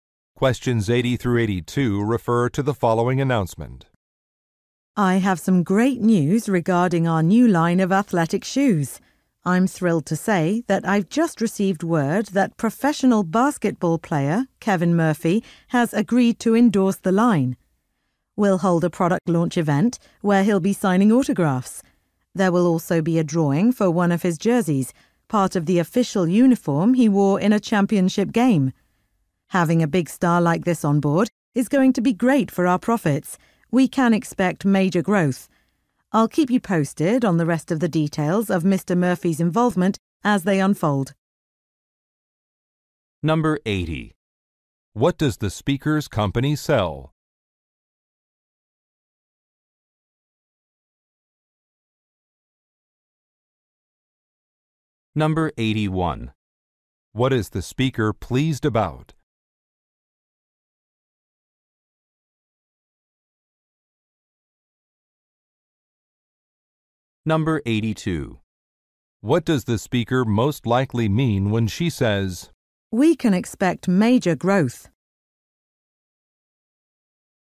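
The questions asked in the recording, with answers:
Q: What does the speaker's company sell?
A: Athletic shoes

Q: What is the speaker pleased about?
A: A famous basketball player agreed to endorse the line

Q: What does the speaker most likely mean when she says,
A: She expects sales to increase greatly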